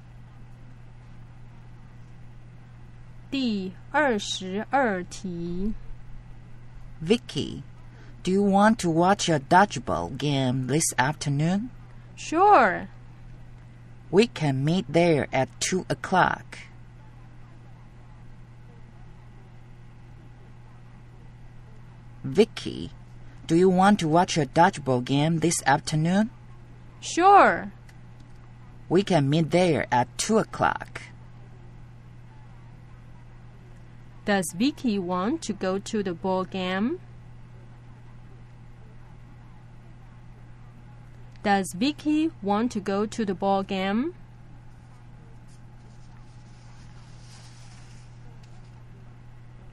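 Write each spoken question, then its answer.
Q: Does Vicky want to go to the ball game?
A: Yes, she does.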